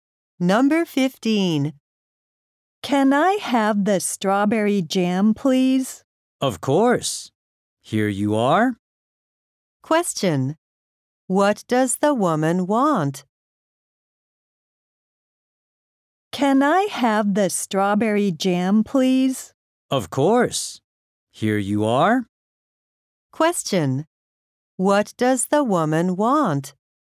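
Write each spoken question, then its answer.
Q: What does the woman want?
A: The strawberry jam.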